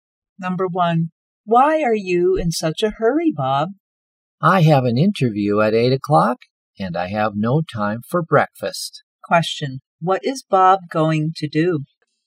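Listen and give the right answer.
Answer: Have an interview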